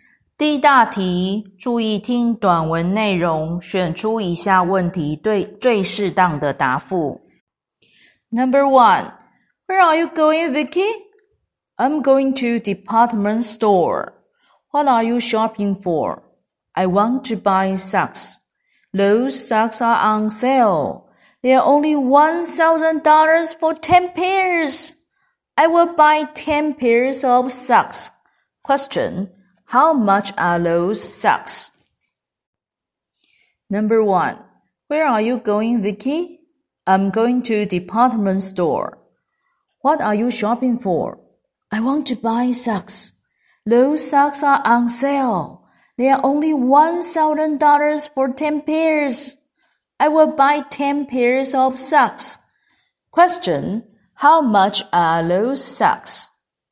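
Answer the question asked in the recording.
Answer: $1,000 for 10 pairs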